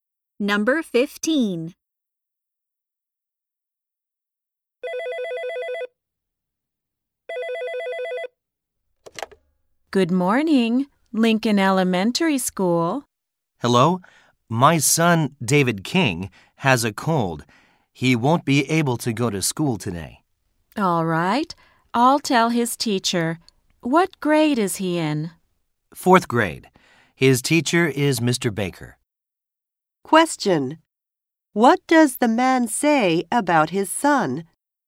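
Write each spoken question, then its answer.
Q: What does the man say about his son?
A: He has a cold and can't go to school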